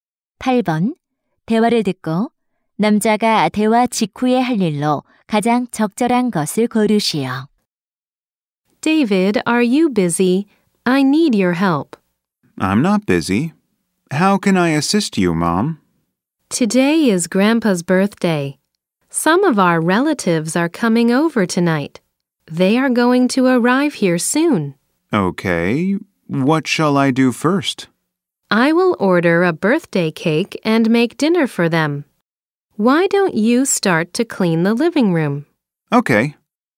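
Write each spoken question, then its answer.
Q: 대화를 듣고 남자가 대화 직후에 할 일로 가장 적절한 것을 고르시오.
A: 거실 청소하기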